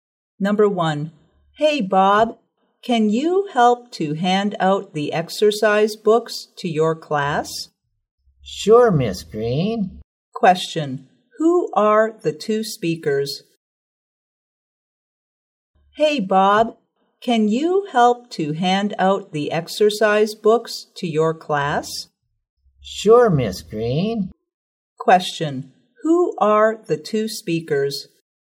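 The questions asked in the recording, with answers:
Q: who are the two speakers?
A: A teacher (Miss Green) and a student (Bob)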